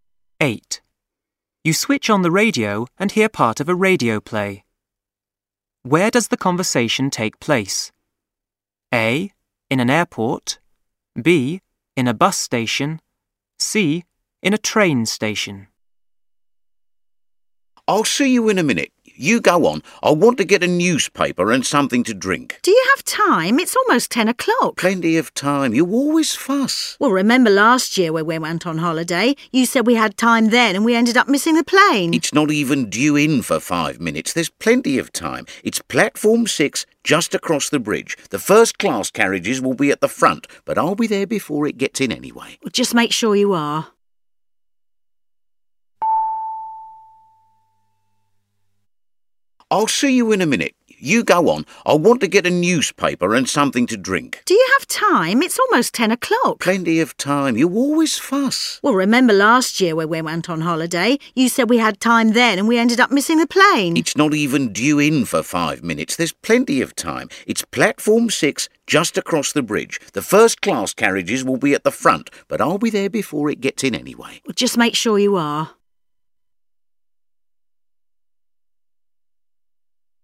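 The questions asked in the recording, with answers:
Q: Where does the conversation take place?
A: C: In a train station.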